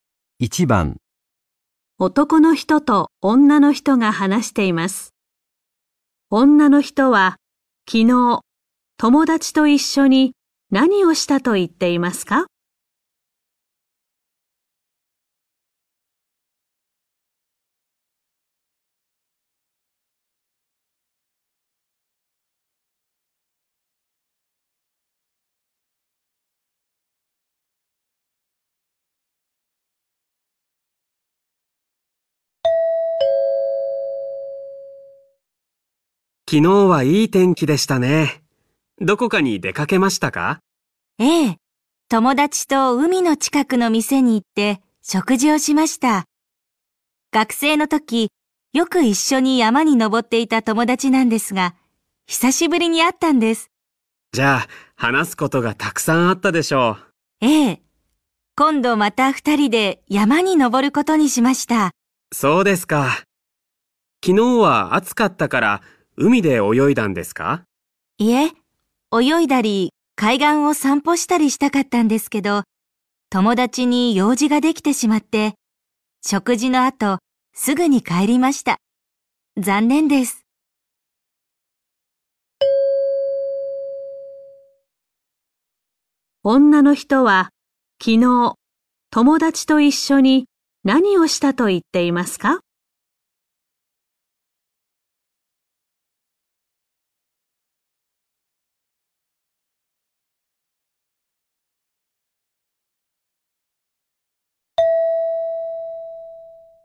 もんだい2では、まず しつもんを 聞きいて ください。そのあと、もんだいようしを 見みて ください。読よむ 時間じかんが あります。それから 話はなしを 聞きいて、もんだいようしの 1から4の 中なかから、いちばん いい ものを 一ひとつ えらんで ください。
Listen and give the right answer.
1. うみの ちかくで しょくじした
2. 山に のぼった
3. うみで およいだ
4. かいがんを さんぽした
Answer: 1. うみの ちかくで しょくじした

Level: N4 Listening · Test 1